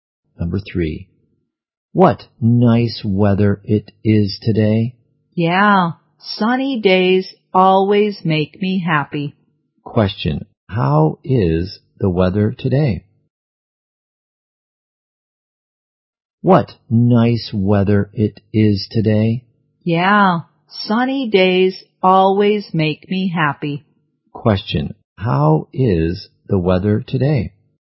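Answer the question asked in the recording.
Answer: Sunny.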